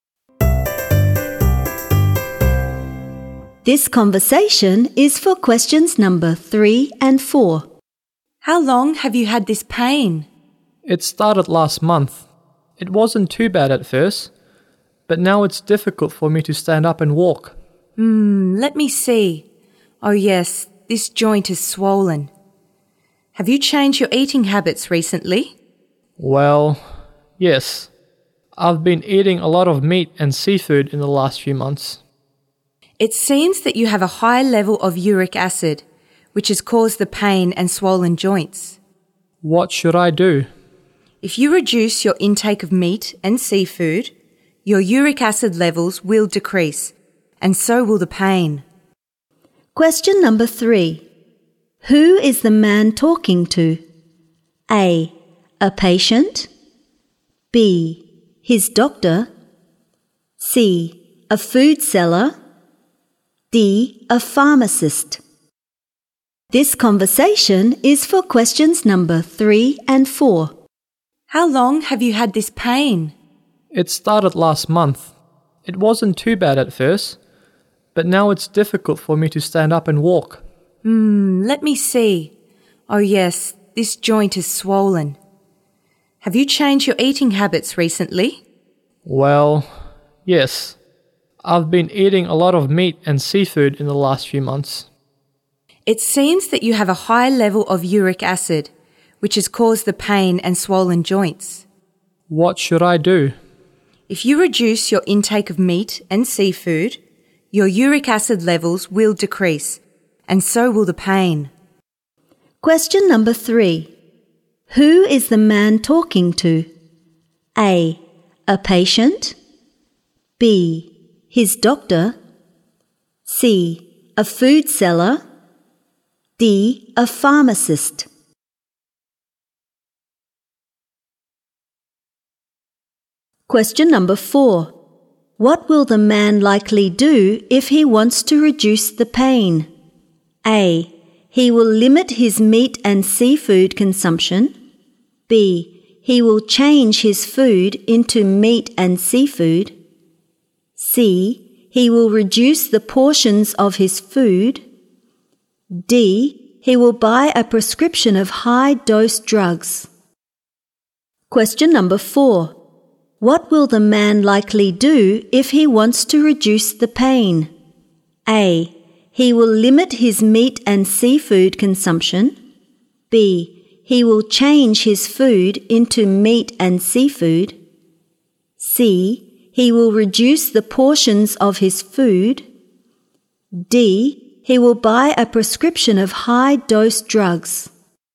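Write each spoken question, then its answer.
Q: What will the man likely do if he wants to reduce the pain?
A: A: He will limit his meat and seafood consumption.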